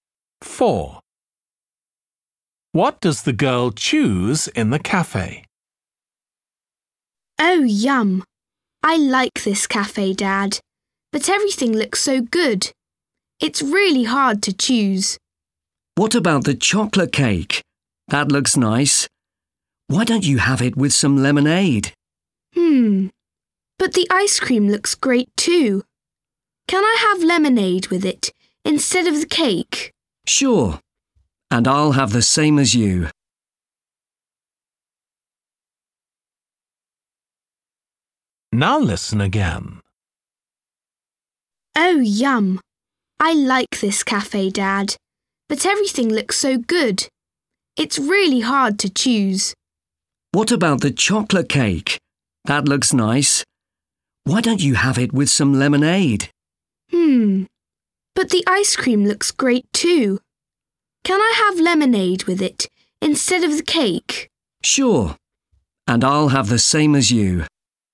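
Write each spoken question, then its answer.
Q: What does the girl choose in the cafe?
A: ice cream and lemonade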